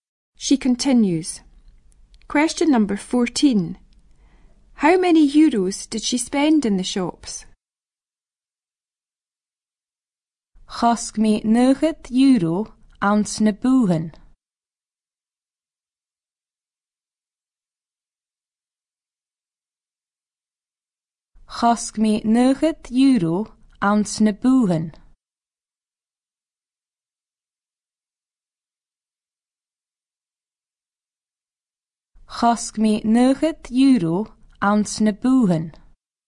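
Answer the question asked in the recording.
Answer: 90 euros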